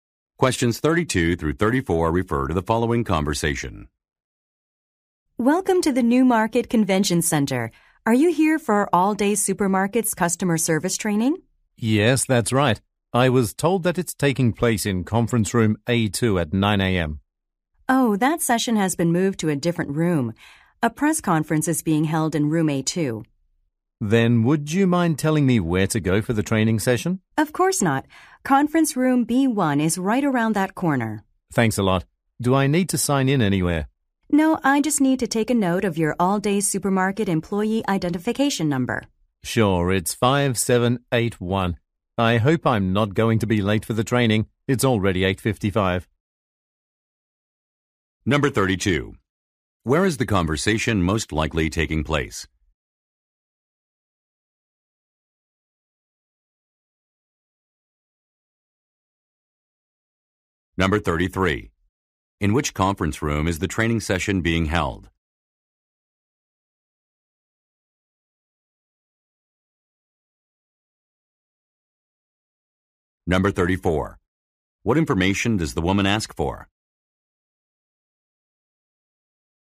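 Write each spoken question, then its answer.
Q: Where is the conversation most likely taking place?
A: At the Newmarket Convention Center

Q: In which conference room is the training session being held?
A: Conference room B1

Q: What information does the woman ask for?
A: His employee identification number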